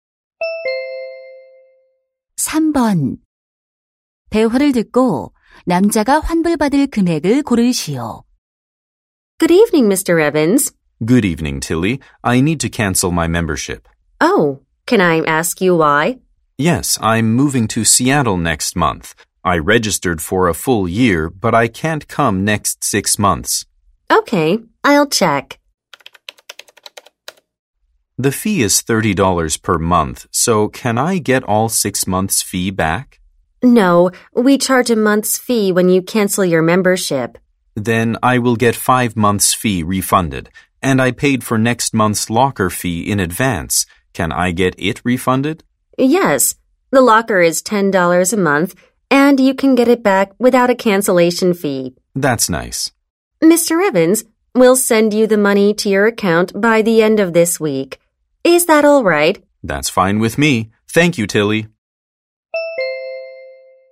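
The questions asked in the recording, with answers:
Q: 대화를 듣고 남자가 환불받을 금액을 고르시오.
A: $160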